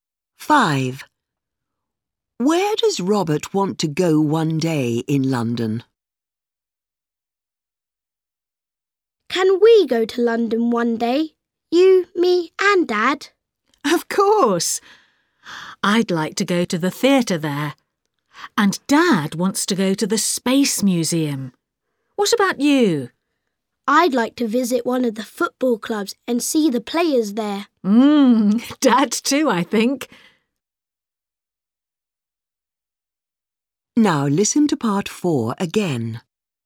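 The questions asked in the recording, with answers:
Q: Where does Robert want to go one day in London?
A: A football club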